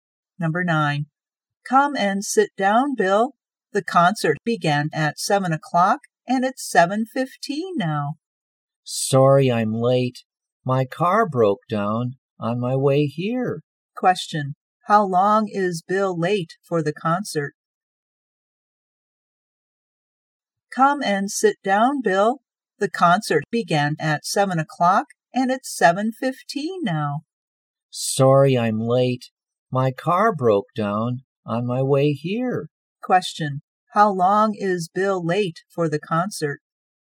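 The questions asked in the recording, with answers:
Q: How long is Bill late for the concert?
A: 15 minutes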